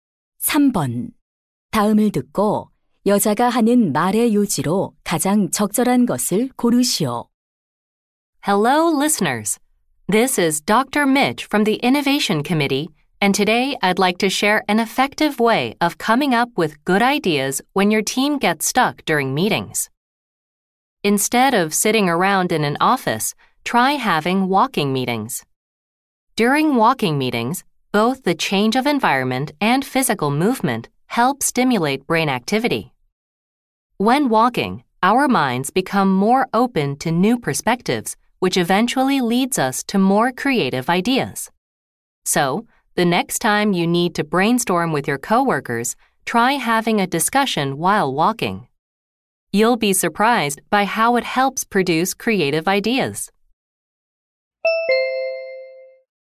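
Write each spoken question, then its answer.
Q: 다음을 듣고 여자가 하는 말의 요지로 가장 적절한 것을 고르시오.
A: 걷기 회의는 창의적인 아이디어를 내는 데 도움이 된다.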